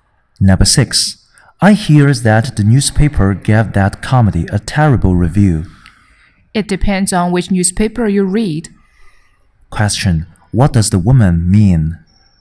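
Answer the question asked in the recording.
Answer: Different newspapers gave different reviews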